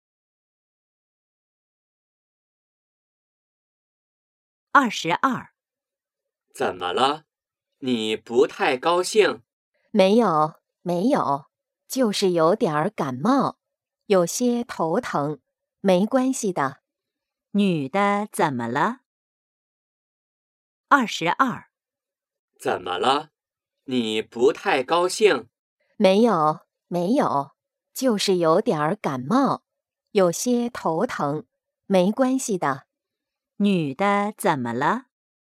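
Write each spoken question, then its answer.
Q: 女的怎么了?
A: 有点感冒,头疼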